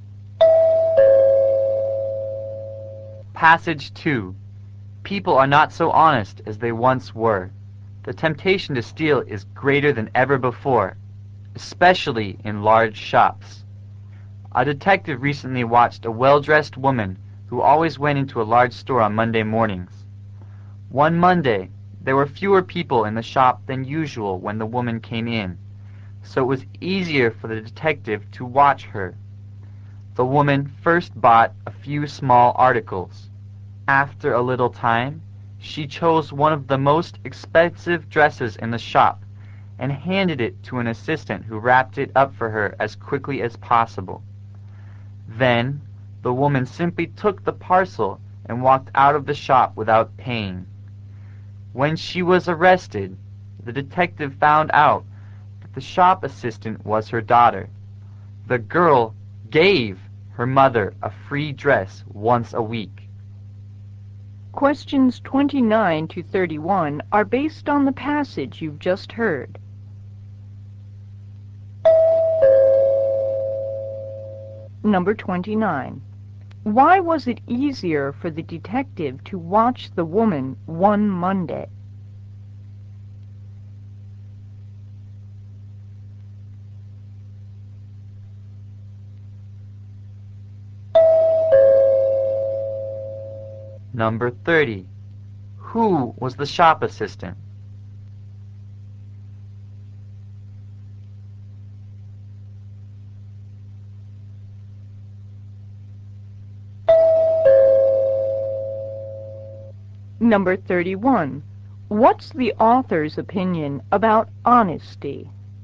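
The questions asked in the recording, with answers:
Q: Why was it easier for the detective to watch the woman one Monday?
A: There were fewer people in the shop than usual

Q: Who was the shop assistant?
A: The woman's daughter

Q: What's the author's opinion about honesty?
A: People are less honest than they once were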